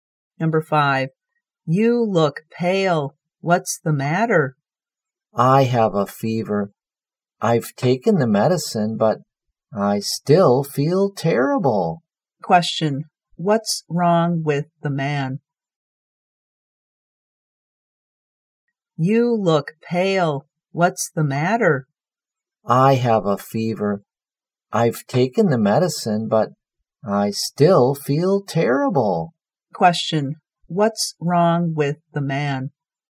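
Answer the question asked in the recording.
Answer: He has a fever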